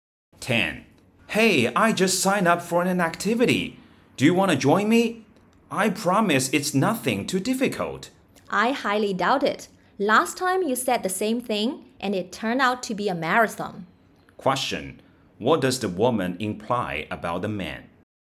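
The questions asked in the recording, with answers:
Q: What does the woman imply about the man?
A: His promises that things are easy can't be trusted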